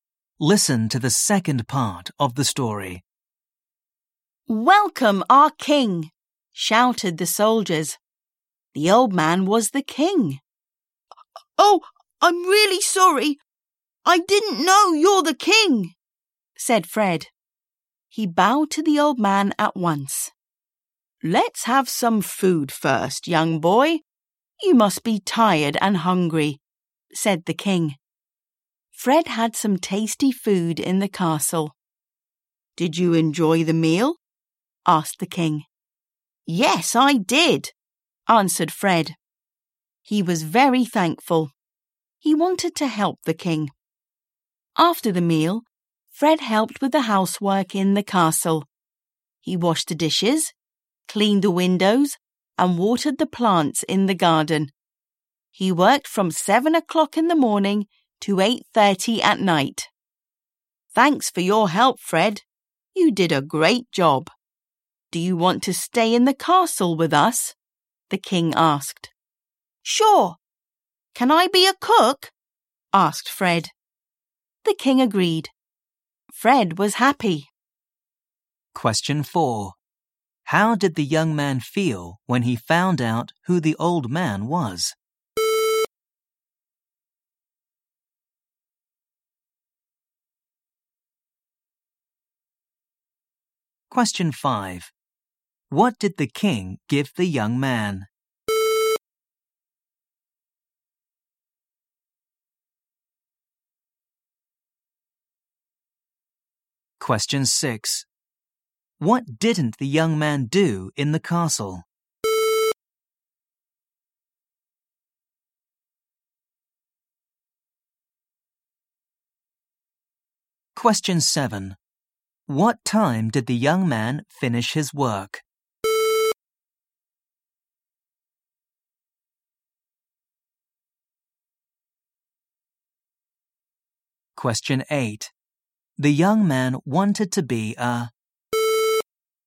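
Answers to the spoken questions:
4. sorry
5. some tasty food
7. 8:30 at night
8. cook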